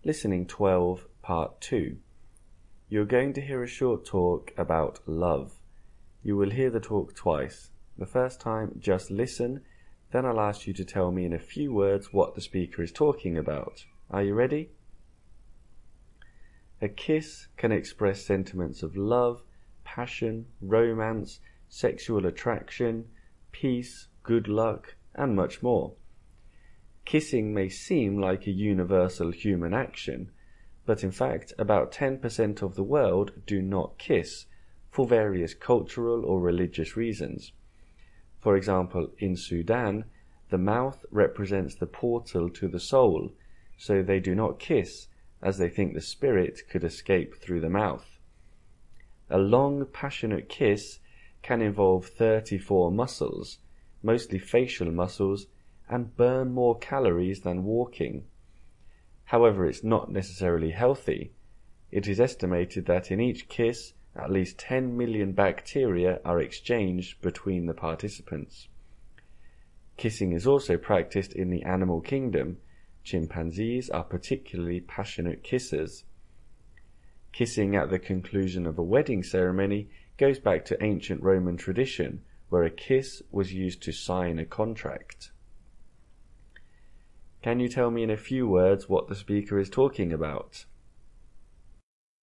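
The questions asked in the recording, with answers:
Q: Can you tell me in a few words what the speaker is talking about?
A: Kissing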